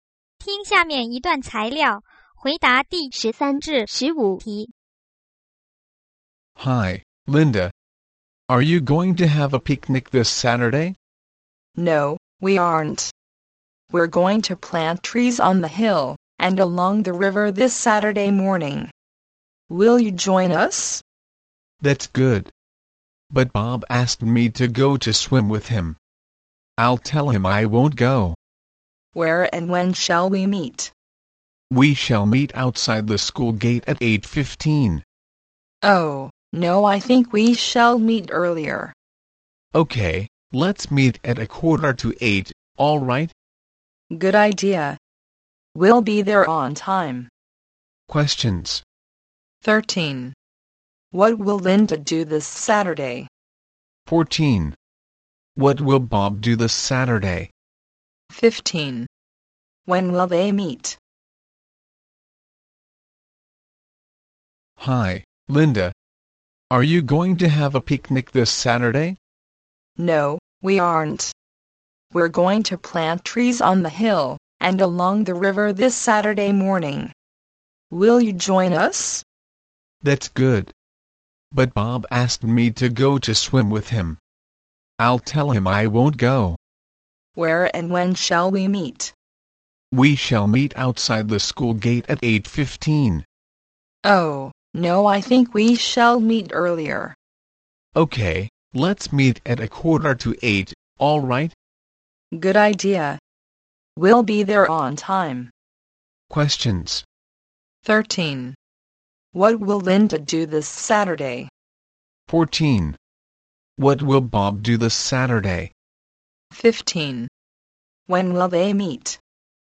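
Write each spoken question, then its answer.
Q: 13. What will Linda do this Saturday?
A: Plant trees

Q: 15. When will they meet?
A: At 7:45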